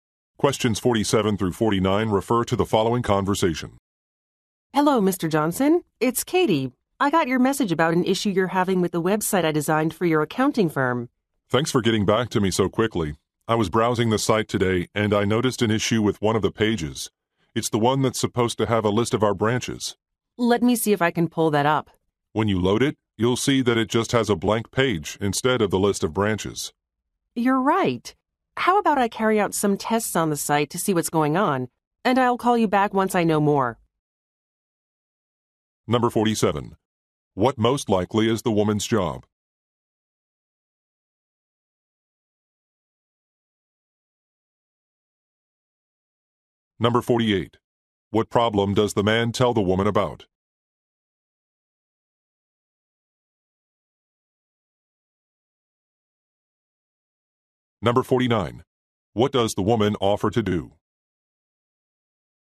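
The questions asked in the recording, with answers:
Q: What most likely is the woman's job?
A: Web designer

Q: What problem does the man tell the woman about?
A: A web page showing a blank page instead of the branch list

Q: What does the woman offer to do?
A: Run tests on the site and call back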